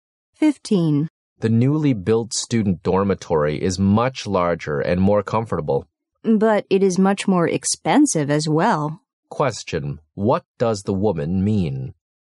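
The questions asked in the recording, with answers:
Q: what does the woman mean?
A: The new dormitory is much more expensive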